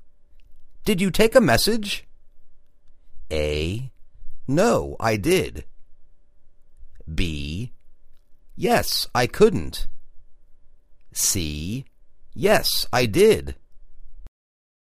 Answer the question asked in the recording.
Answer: Yes, I did